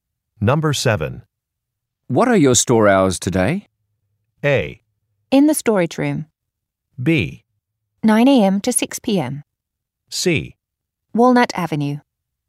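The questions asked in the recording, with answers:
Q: What are your store hours today?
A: B: 9 a.m. to 6 p.m.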